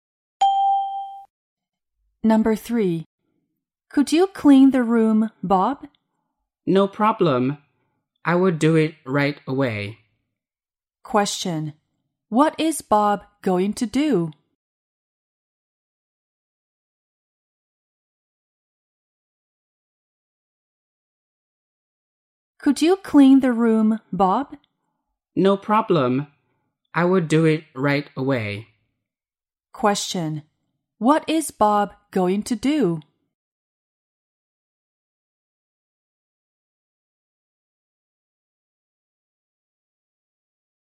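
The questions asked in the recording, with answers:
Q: What is Bob going to do?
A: Clean the room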